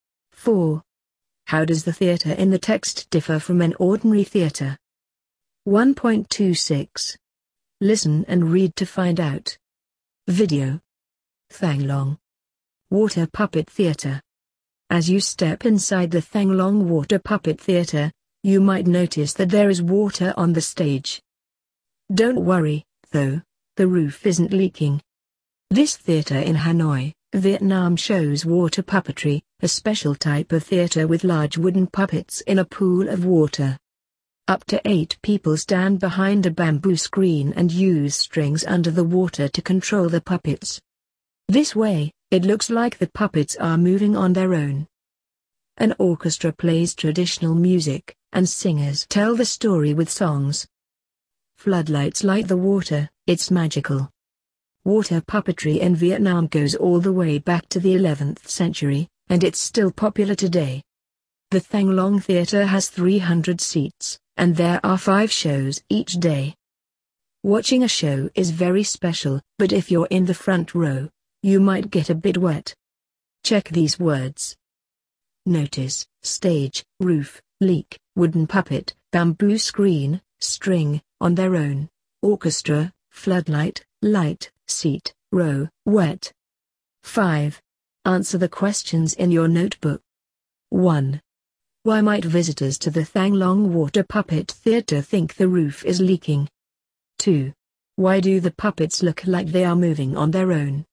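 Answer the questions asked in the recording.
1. Because there is water on the stage.
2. People behind a bamboo screen control them with strings under the water.
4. There is water on the stage; puppets are moved in a pool of water.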